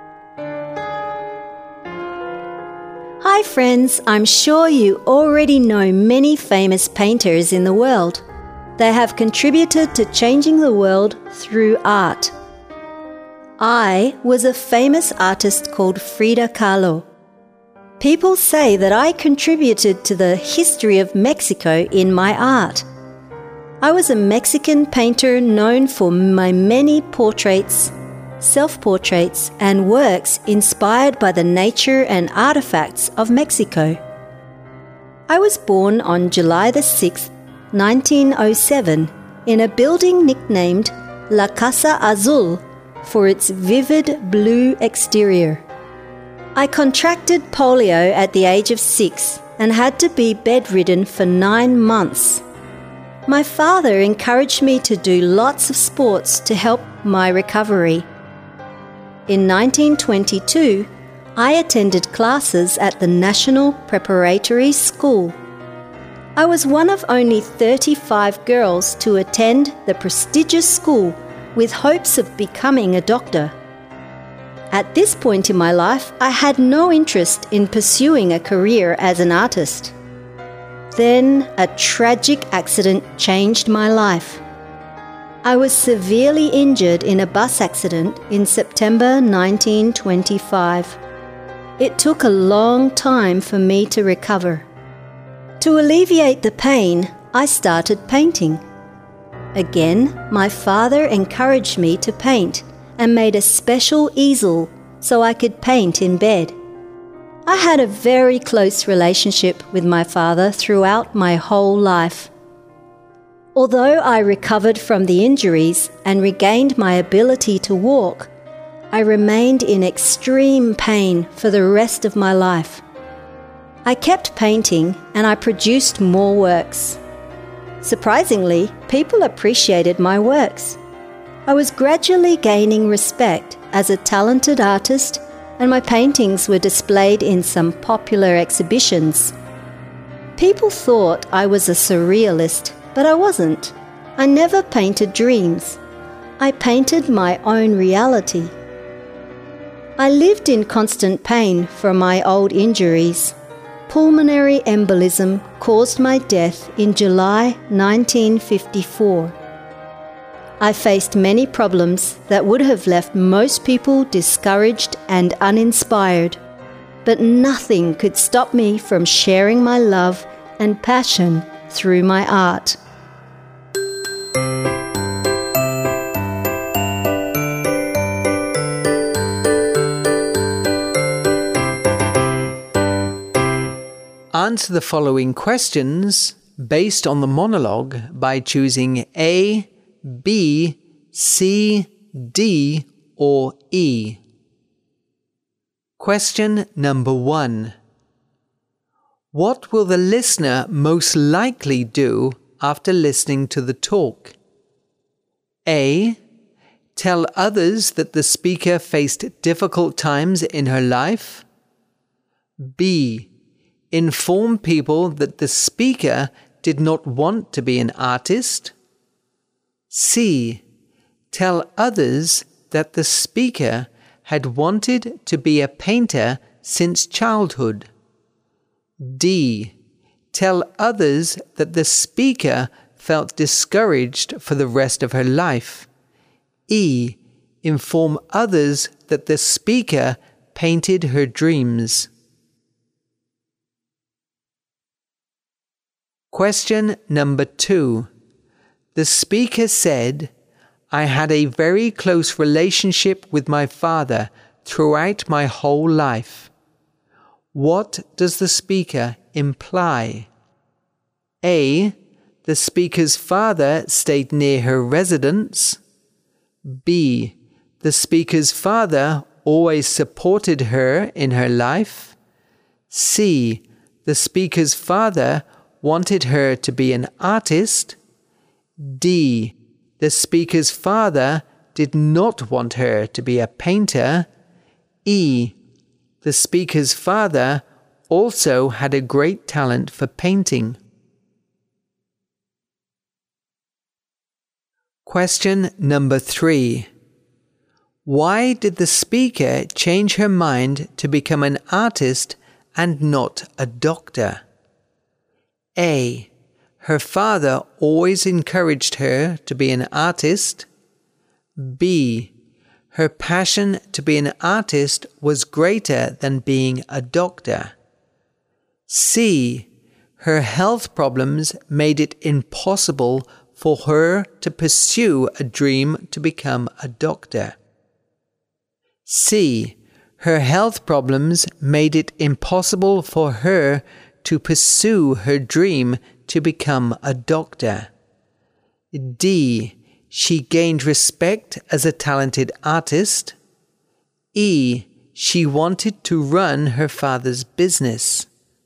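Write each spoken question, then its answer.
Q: What will the listener most likely do after listening to the talk?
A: A: Tell others that the speaker faced difficult times in her life.

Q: The speaker said, I had a very close relationship with my father throughout my whole life. What does the speaker imply?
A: B: The speaker's father always supported her in her life.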